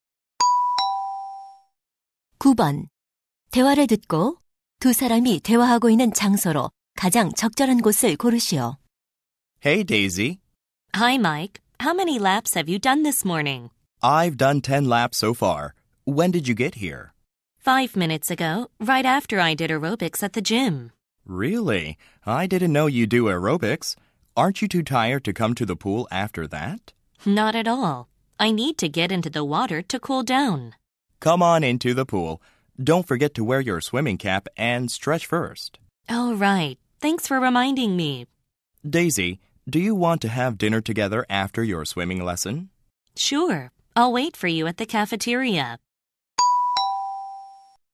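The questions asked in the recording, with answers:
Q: 대화를 듣고 두 사람이 대화하고 있는 장소로 가장 적절한 곳을 고르시오.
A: 수영장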